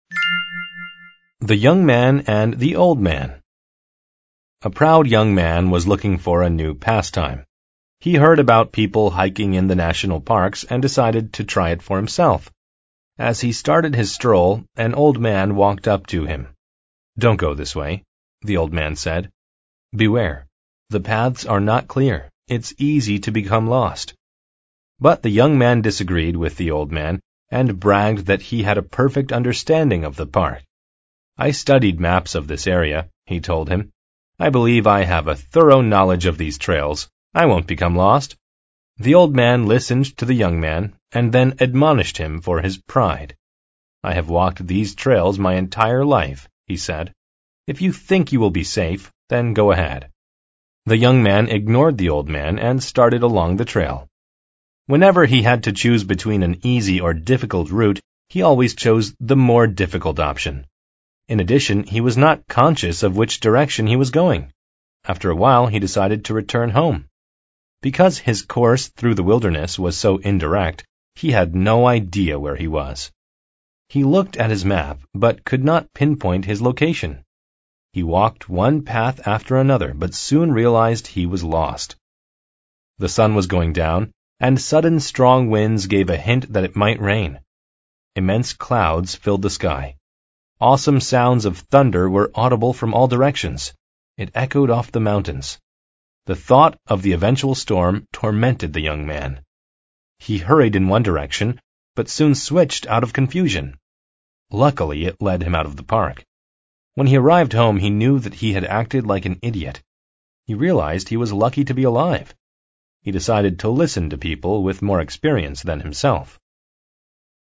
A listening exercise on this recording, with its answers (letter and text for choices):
Part A: Mark each statement T for true or F for false. Rewrite the false statements to make them true.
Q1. The young man decided to hike in the national parks.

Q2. The young man disagreed with the old man.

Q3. The young man believed that his knowledge of the park's trails was thorough.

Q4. When the young man had an option of two trails, he always chose the easier one.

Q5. The young man was tormented by the thought of the eventual storm.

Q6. When the young man got home, he knew that the old man had acted like an idiot.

Part B: Answer the questions.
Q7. What did the young man choose as his new pastime?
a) Picking trails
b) Climbing mountains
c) Talking with old men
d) Hiking in parks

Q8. Why did the old man admonish the young man?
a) The young man was awesome.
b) The young man bragged that he was perfect.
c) The young man's route was too indirect.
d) The young man chose difficult trails.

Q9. Why did the young man become lost?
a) He was not conscious of where he went.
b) He pinpointed his location on his map.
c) He did not switch to an easier trail.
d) He listened to the old man's advice.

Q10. Which of the following gave a hint of an eventual storm?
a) The sudden strong winds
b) The sparse clouds in the sky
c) The weather getting colder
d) The lightining flashing in the sky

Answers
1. T
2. T
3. T
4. F
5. T
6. F
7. d) Hiking in parks
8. b) The young man bragged that he was perfect.
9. a) He was not conscious of where he went.
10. a) The sudden strong winds

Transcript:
A proud young man was looking for a new pastime. He heard about people hiking in the national parks and decided to try it for himself. As he started his stroll, an old man walked up to him.
"Don't go this way," the old man said. "Beware. The paths are not clear. It's easy to become lost."
But the young man disagreed with the old man and bragged that he had a perfect understanding of the park. "I studied maps of this area," he told him. "I believe I have a thorough knowledge of these trails. I won't become lost."
The old man listened to the young man and then admonished him for his pride.
"I have walked these trails my entire life," he said. "If you think you will be safe, then go ahead."
The young man ignored the old man and started along the trail.
Whenever he had to choose between an easy or difficult route, he always chose the more difficult option. In addition, he was not conscious of which direction he was going. After a while, he decided to return home. Because his course through the wilderness was so indirect, he had no idea where he was.
He looked at his map but could not pinpoint his location. He walked one path after another but soon realized he was lost.
The sun was going down, and sudden strong winds gave a hint that it might rain. Immense clouds filled the sky. Awesome sounds of thunder were audible from all directions. It echoed off the mountains. The thought of the eventual storm tormented the young man. He hurried in one direction, but soon switched out of confusion. Luckily, it led him out of the park.
When he arrived home, he knew that he had acted like an idiot. He realized he was lucky to be alive. He decided to listen to people with more experience than himself.